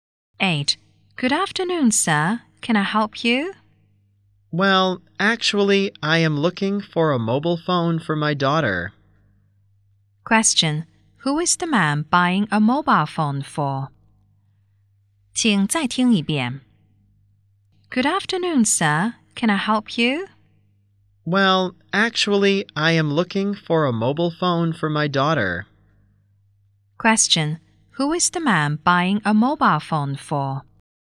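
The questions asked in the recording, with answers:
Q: Who is the man buying a mobile phone for?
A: His daughter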